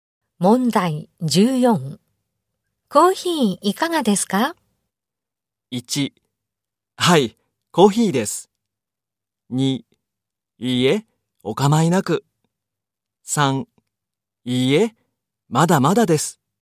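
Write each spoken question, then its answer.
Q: コーヒーいかがですか?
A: 2: いいえ、お構いなく。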